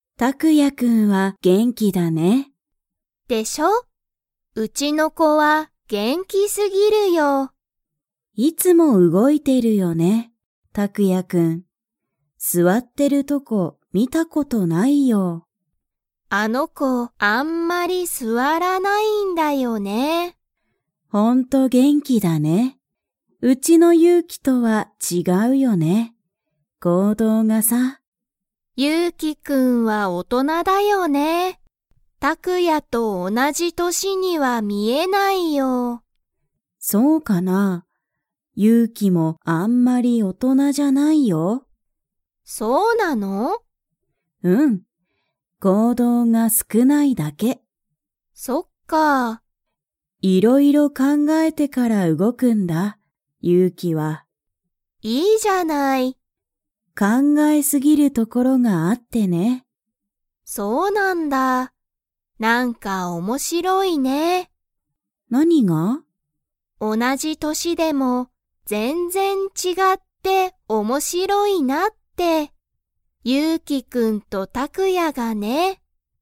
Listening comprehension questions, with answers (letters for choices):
Comprehension Quiz (Skip if you don't understand the conversation yet)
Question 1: たくやくんはいつも、何なにをしていますか?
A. 座すわってる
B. 動うごいてる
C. 本ほんを読よんでる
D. 絵えを描かいてる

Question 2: ゆうきくんとたくやくんの行動こうどうは 。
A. 同おなじ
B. 違ちがう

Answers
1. B
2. B

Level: Level 3